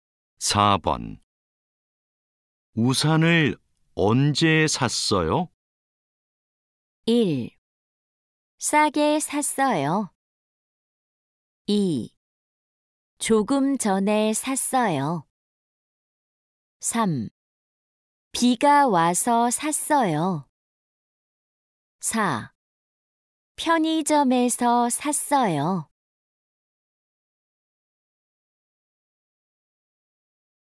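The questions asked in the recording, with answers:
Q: 우산을 언제 샀어요?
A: 2: 조금 전에 샀어요.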